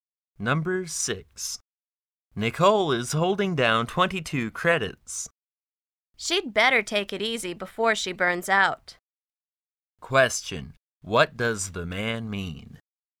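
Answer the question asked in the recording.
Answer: Nicole is taking too many credits and should slow down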